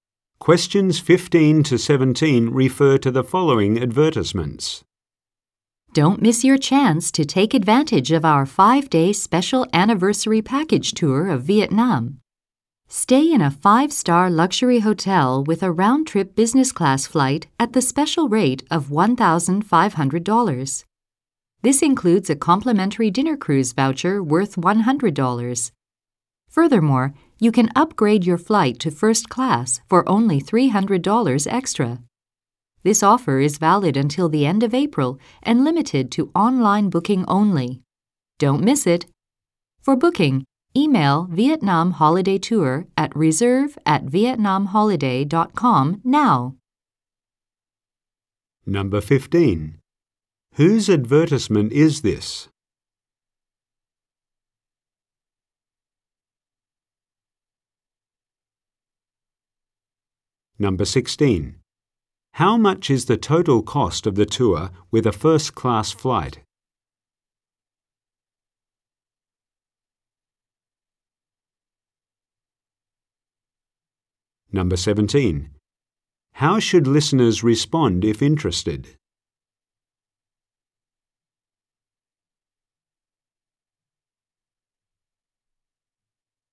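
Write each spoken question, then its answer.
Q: Whose advertisement is this?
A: Vietnam Holiday Tour

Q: How much is the total cost of the tour with a first-class flight?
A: $1,800

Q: How should listeners respond if interested?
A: By emailing reserve@vietnamholiday.com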